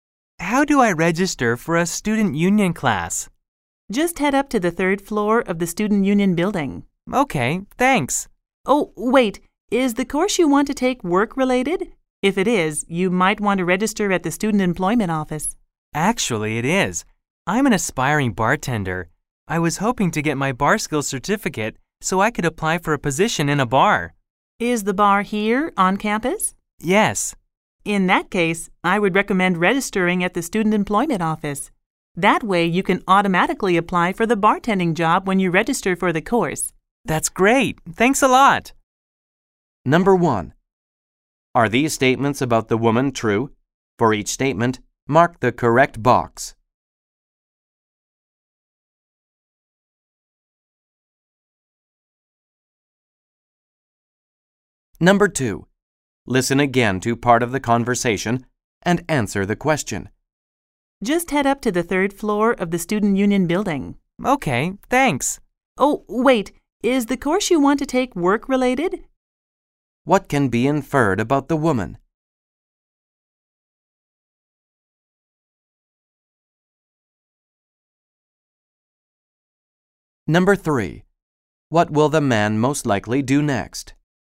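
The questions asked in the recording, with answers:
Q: What will the man most likely do next?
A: Register for the bartending course at the student employment office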